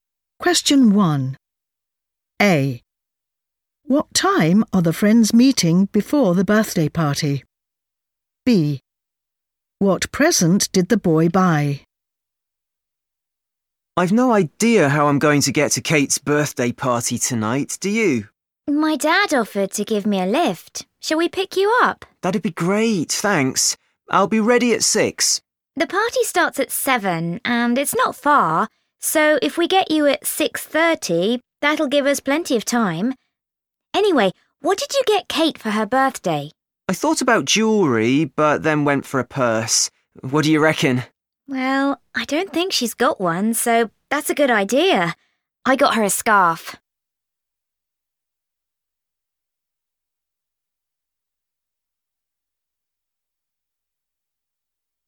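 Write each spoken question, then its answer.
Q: What time are the friends meeting before the birthday party?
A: 6:30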